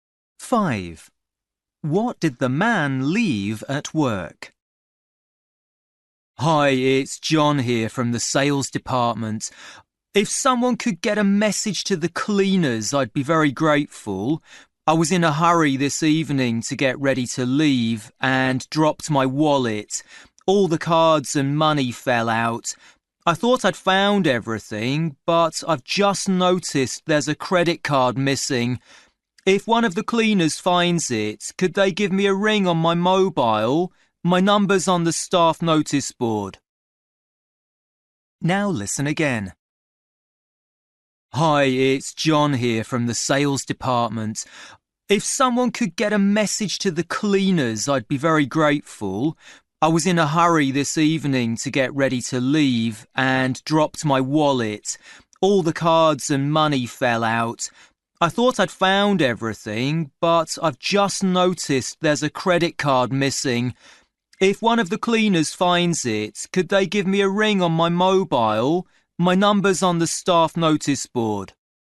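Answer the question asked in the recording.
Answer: a credit card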